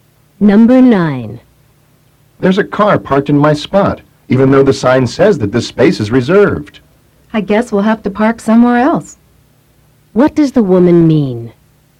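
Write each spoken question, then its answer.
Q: What does the woman mean?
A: They need to find a different parking place.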